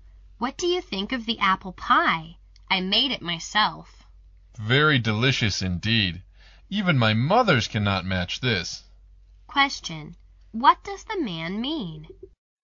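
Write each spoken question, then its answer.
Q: What does the man mean?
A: The apple pie is excellent, better than his mother's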